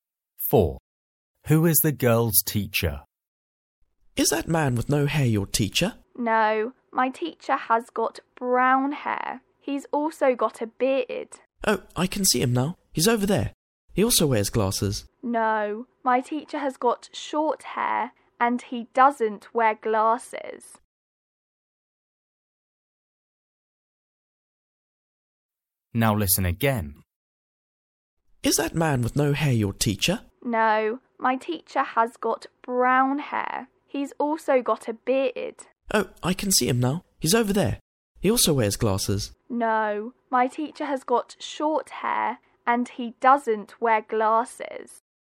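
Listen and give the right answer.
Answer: The man with short brown hair and a beard, no glasses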